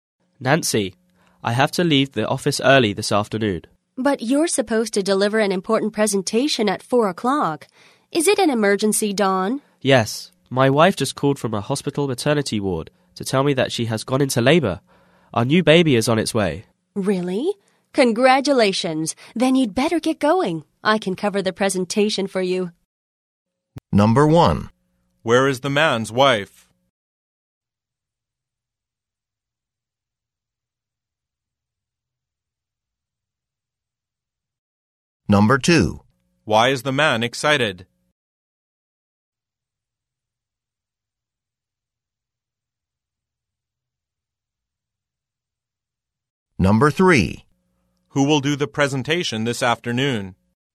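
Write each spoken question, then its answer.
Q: Where is the man's wife?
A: At the hospital maternity ward

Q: Why is the man excited?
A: His new baby is on its way

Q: Who will do the presentation this afternoon?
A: Nancy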